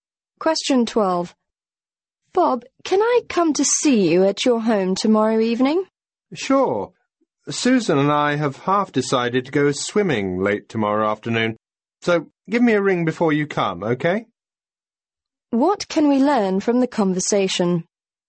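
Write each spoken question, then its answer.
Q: What can we learn from the conversation?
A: Bob may go swimming tomorrow afternoon, so the woman should call before coming.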